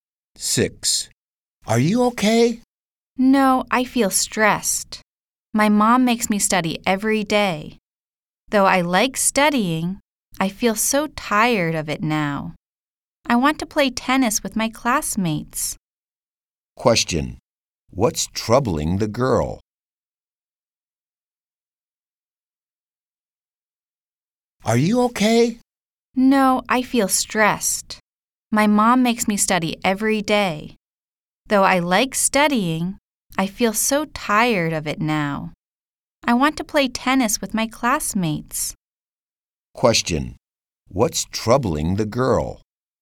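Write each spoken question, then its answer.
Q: What's troubling the girl?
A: Her mom makes her study every day, and she feels stressed.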